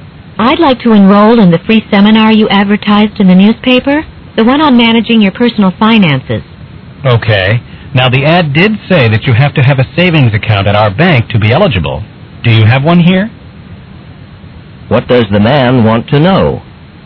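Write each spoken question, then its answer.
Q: What does the man want to know?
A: Whether the woman has a savings account at the bank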